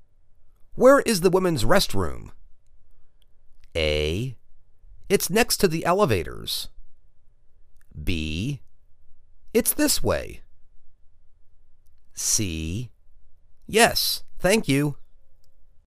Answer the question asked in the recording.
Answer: It's next to the elevators.